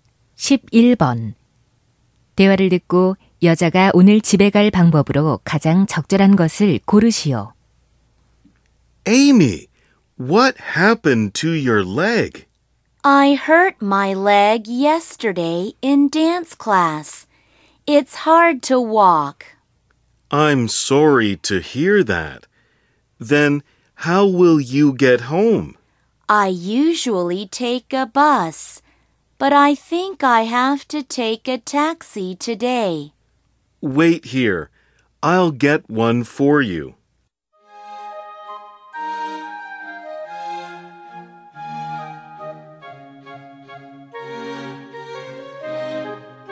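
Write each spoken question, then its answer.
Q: 대화를 듣고 여자가 오늘 집에 갈 방법으로 가장 적절한 것을 고르시오.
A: 택시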